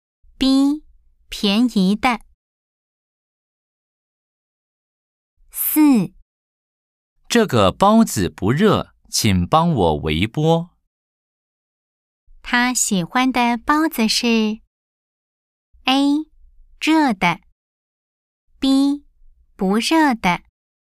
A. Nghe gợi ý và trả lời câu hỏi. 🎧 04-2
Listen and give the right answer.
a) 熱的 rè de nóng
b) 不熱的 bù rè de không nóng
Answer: a) 熱的 rè de nóng